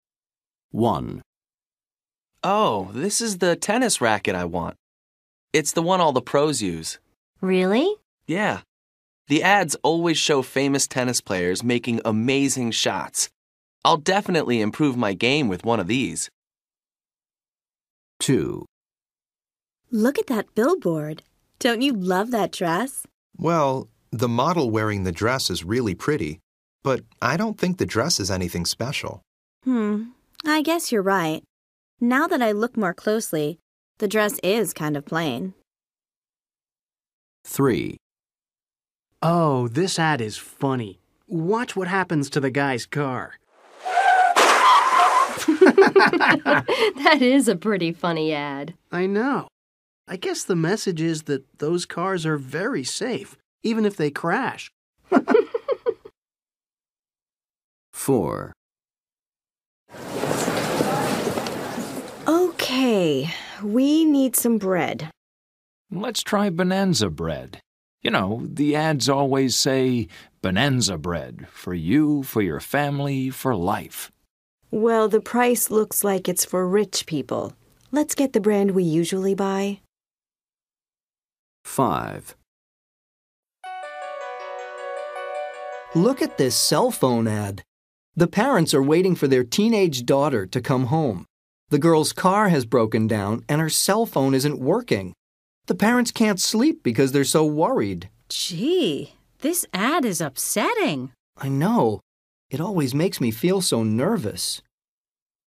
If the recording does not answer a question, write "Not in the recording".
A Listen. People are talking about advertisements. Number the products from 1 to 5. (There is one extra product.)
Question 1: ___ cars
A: 3

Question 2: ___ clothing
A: 2

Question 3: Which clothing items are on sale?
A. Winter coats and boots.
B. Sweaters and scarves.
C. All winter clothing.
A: Not in the recording

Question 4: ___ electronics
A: 5

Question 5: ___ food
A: 4

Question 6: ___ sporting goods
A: 1

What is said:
1
Man: Oh, this is the tennis racket I want. It's the one all the pros use.
Woman: Really?
Man: Yeah. The ads always show famous tennis players making amazing shots. I'll definitely improve my game with one of these.
2
Woman: Look at that billboard. Don't you love that dress?
Man: Well, the model wearing the dress is really pretty, but I don't think the dress is anything special.
I guess you're right. Now that I look more closely, the dress is kind of pain.
3
Man: Oh, this ad is funny. Watch what happens to the guy's car! [car crashes]
Woman: That is a pretty funny ad.
Man: I know. I guess the message is that those cars are very safe, even if they crash.
4
Woman: OK, we need some bread.
Man: Let's try Bonanza Bread! You know, the ads always say "Bonanza Bread – for you, for your family, for life."
Woman: Well, the price looks like it's for rich people. Let's get the brand we usually buy.
5
Man: Look at this cell phone ad. The parents are waiting for their teenaged daughter to come home. The girl's car has broken down, and her cell phone isn't working. The parents can't sleep because they're so worried.
Woman: Gee. This ad is upsetting.
Man: I know. It always makes me feel so nervous.

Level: B2